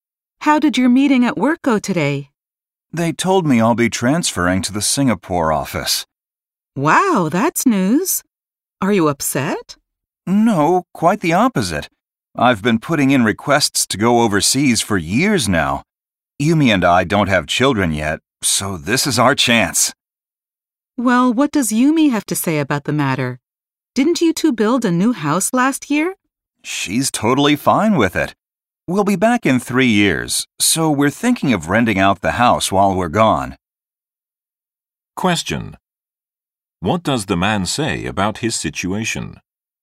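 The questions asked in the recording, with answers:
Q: What does the man say about his situation?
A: He is happy to be transferred to the Singapore office; he has wanted to work overseas for years.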